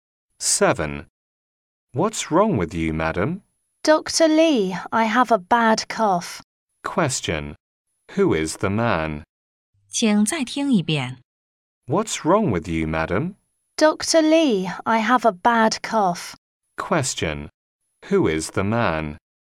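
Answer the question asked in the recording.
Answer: A doctor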